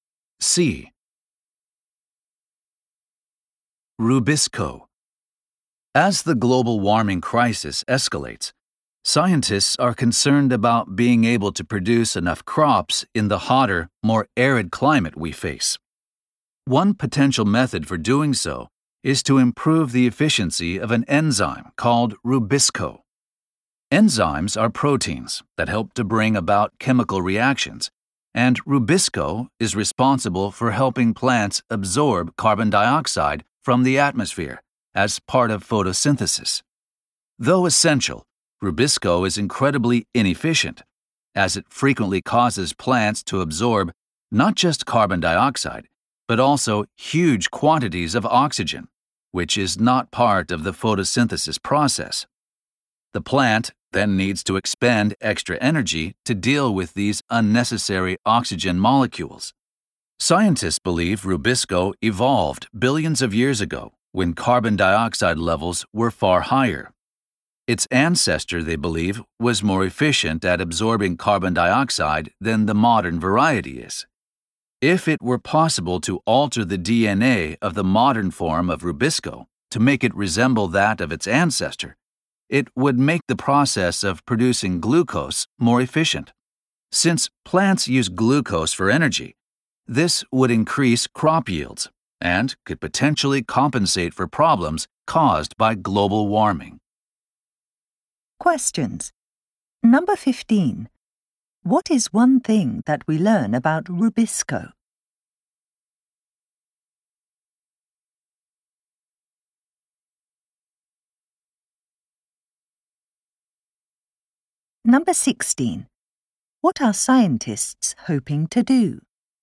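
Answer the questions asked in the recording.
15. It is inefficient because it makes plants take in a lot of oxygen as well as carbon dioxide.
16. Change Rubisco's DNA so it resembles its more efficient ancestor and increases crop yields.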